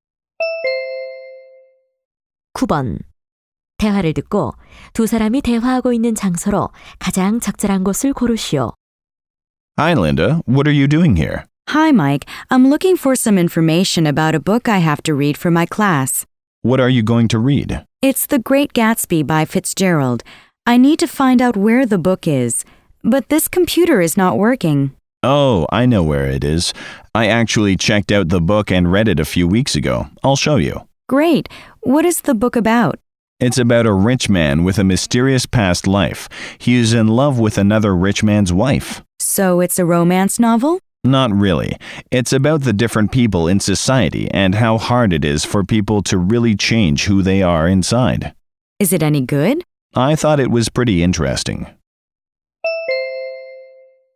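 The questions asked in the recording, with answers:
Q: 대화를 듣고 두 사람이 대화하고 있는 장소로 가장 적절한 곳을 고르시오.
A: 도서관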